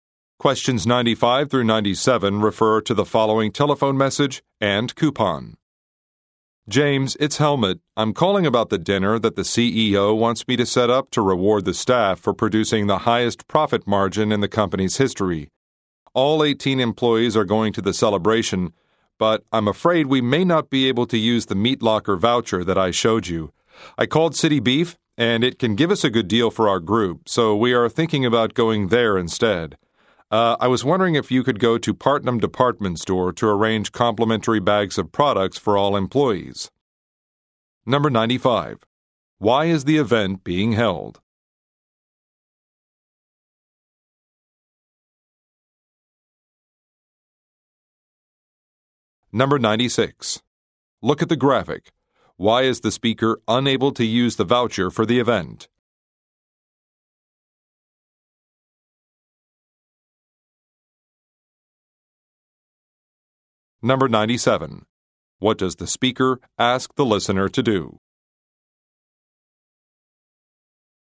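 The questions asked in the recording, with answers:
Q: Why is the event being held?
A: To reward staff for the company's highest profit margin

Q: What does the speaker ask the listener to do?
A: Go to Partnum Department Store to arrange free gift bags for employees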